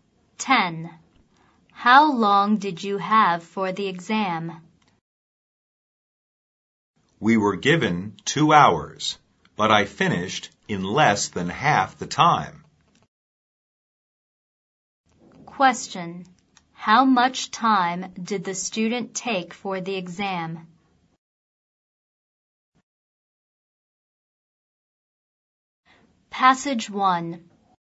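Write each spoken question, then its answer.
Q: How much time did the student take for the exam?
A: Less than one hour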